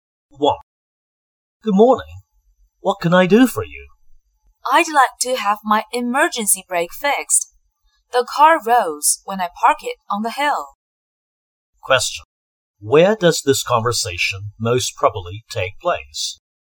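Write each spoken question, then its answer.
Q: Where does this conversation most probably take place?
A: At a garage (car repair shop)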